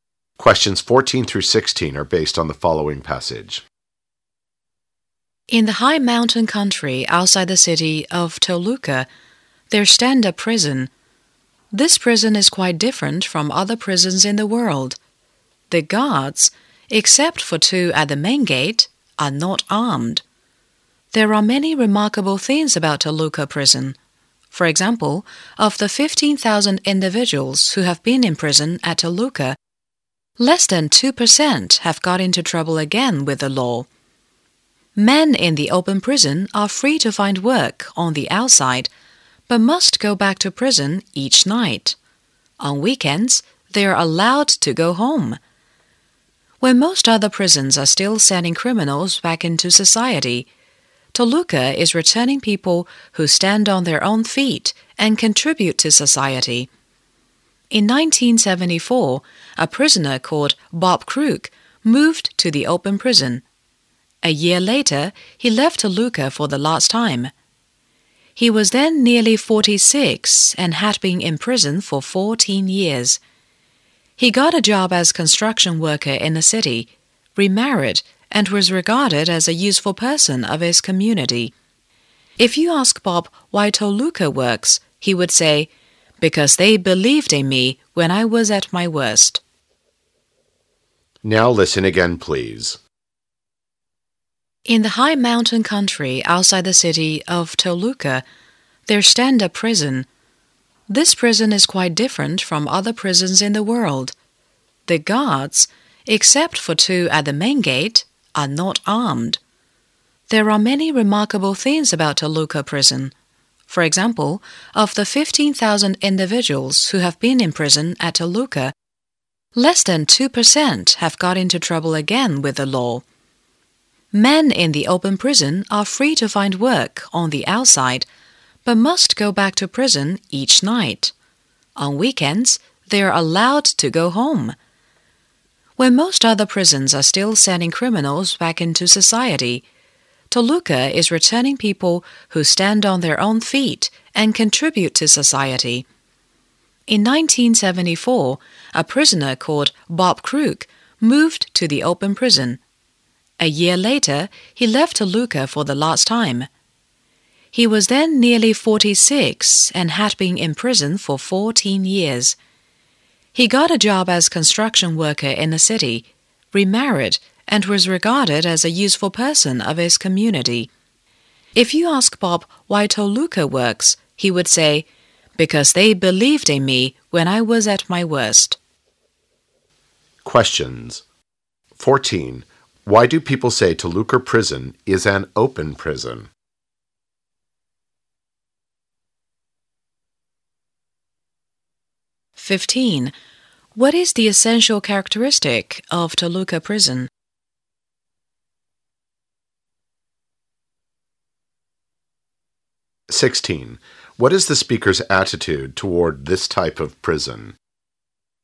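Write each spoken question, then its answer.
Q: Why do people say Toluca Prison is an open prison?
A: Prisoners can work outside and go home on weekends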